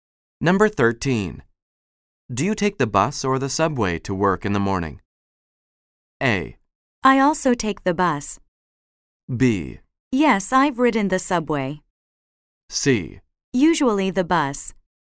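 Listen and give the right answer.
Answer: C: Usually the bus.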